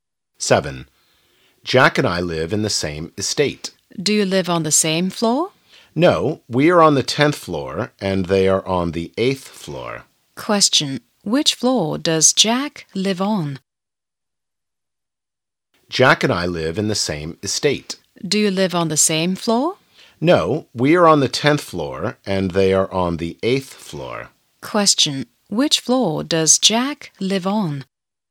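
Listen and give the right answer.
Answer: The 8th floor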